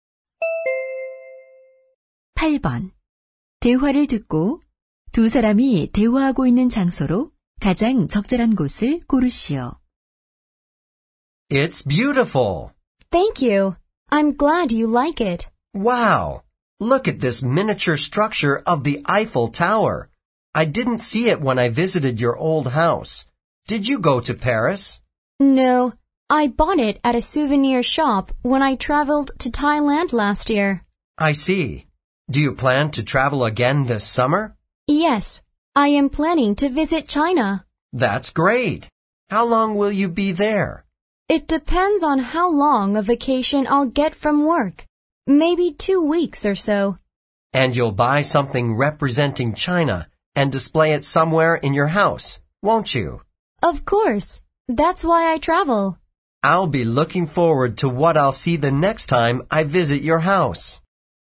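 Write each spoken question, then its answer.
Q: 대화를 듣고 두 사람이 대화하고 있는 장소로 가장 적절한 곳을 고르시오.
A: 여자의 새 집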